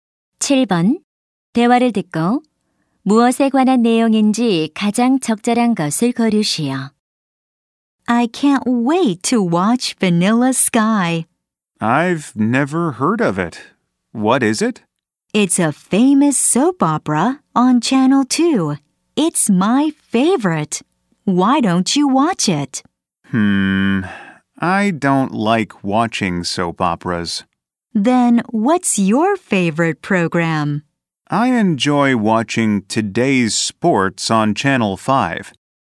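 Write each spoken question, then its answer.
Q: 대화를 듣고 무엇에 관한 내용인지 가장 적절한 것을 고르시오.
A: 좋아하는 TV 프로그램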